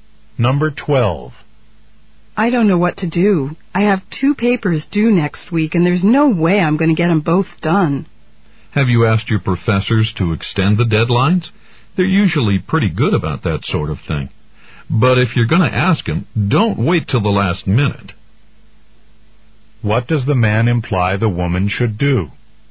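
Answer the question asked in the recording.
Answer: Ask her professors soon for extensions.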